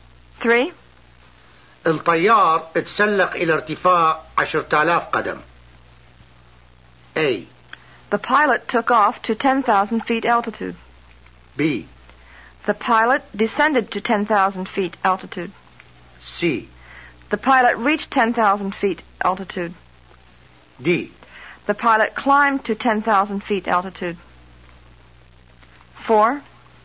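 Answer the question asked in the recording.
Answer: D: The pilot climbed to 10,000 feet altitude.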